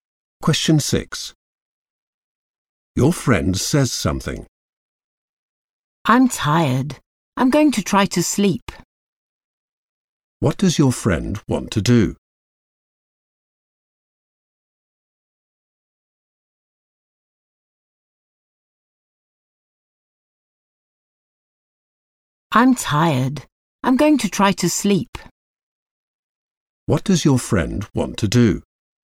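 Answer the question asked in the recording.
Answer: sleep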